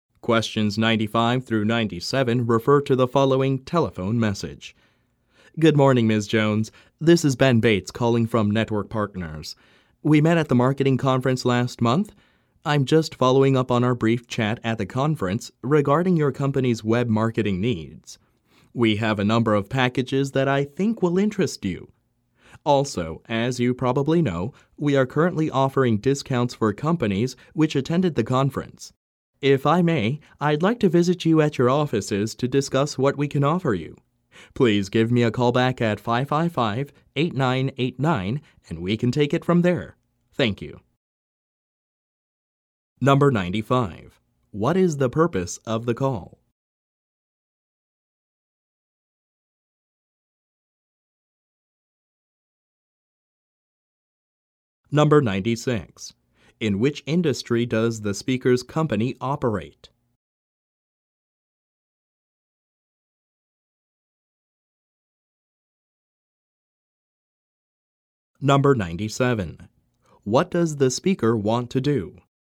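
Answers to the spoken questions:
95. To follow up on a conversation at a conference about web marketing
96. Web marketing
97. Visit Ms. Jones at her offices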